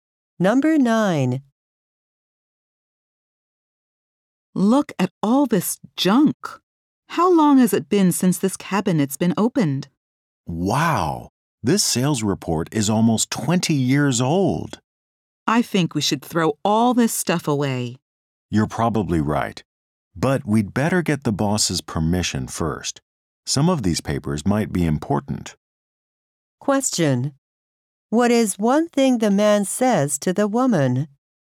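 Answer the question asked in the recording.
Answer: They should get the boss's permission before throwing the papers away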